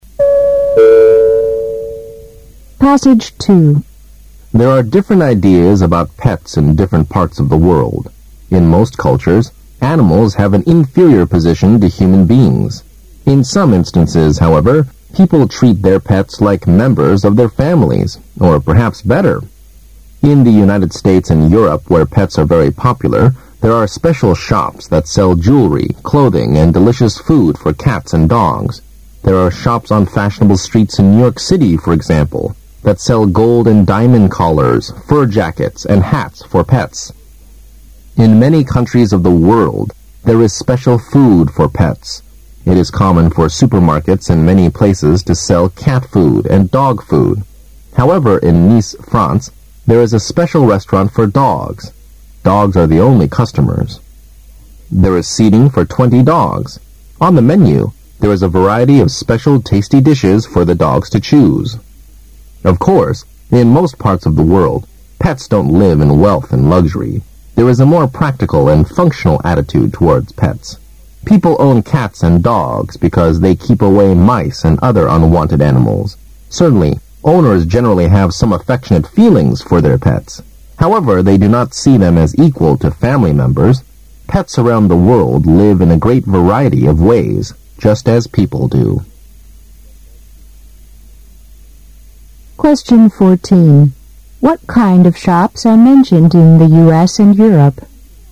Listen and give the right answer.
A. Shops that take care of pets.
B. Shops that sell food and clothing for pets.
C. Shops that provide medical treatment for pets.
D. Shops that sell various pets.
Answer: B. Shops that sell food and clothing for pets.

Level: 大学四级